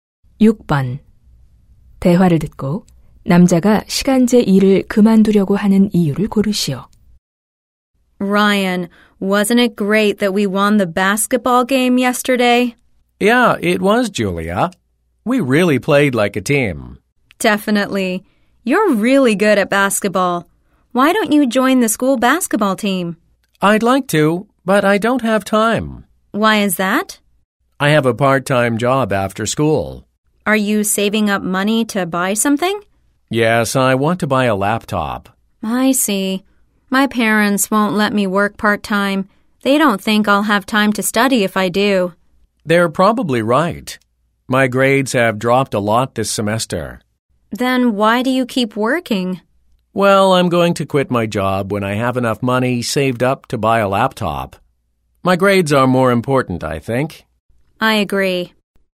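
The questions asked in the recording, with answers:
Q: 대화를 듣고 남자가 시간제 일을 그만두려고 하는 이유를 고르시오.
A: 성적이 많이 떨어져서 (성적이 더 중요해서)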